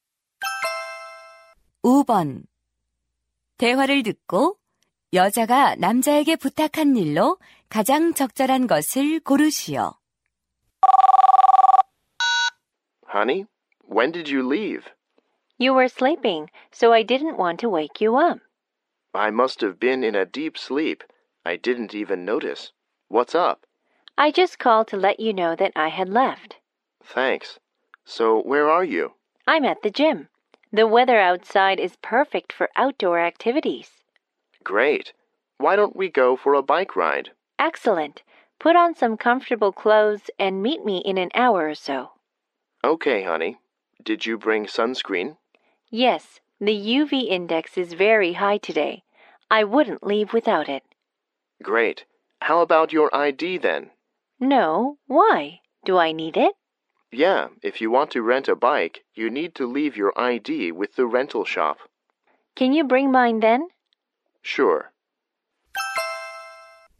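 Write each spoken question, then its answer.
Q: 대화를 듣고 여자가 남자에게 부탁한 일로 가장 적절한 것을 고르시오.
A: 여자의 신분증 가져오기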